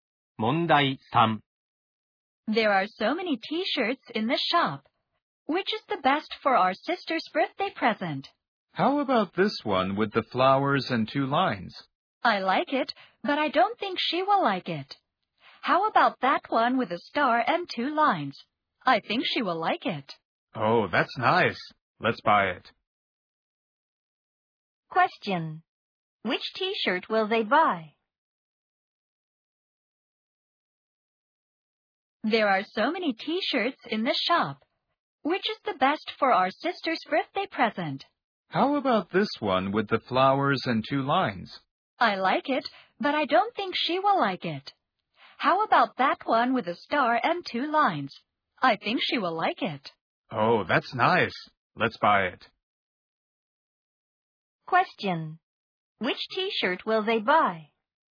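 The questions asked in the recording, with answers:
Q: Which t-shirt will they buy?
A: The one with a star and two lines.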